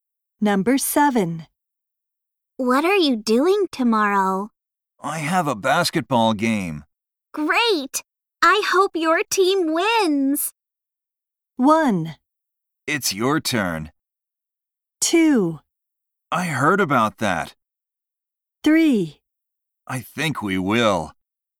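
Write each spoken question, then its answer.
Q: Great! I hope your team wins!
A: 3: I think we will.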